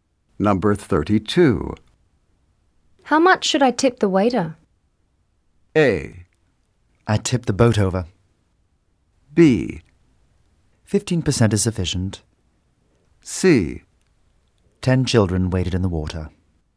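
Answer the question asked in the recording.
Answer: B: 15% is sufficient.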